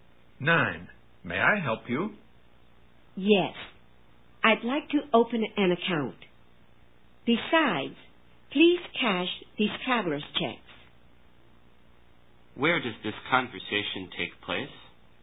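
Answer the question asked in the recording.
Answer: In a bank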